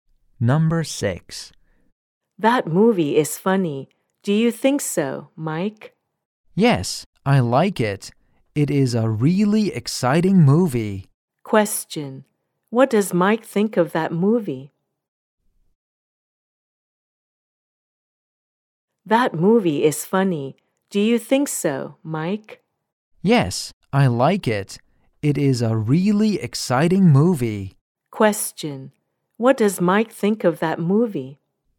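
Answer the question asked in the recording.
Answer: It's really exciting.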